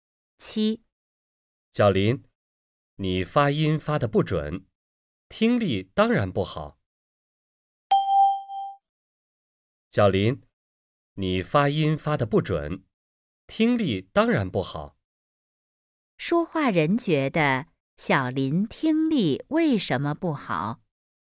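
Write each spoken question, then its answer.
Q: 说话人觉得小林听力为什么不好?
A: 因为发音发得不准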